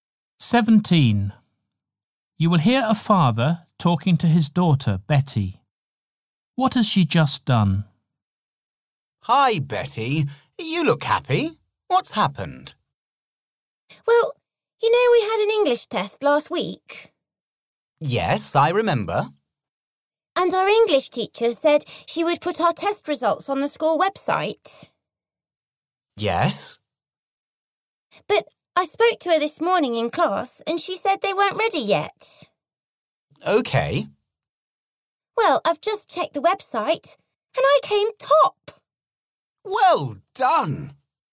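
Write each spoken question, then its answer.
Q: What has she just done?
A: Checked the website and found she came top in the English test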